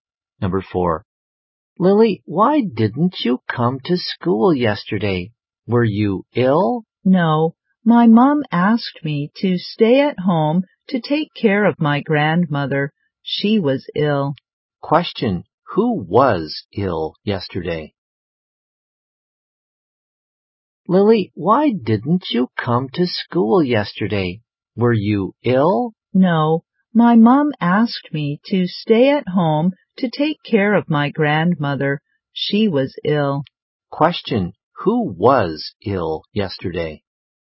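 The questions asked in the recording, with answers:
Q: who was ill yesterday?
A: Lily's grandmother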